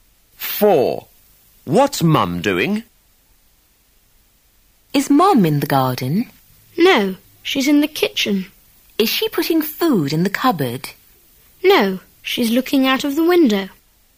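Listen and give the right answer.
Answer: Looking out of the kitchen window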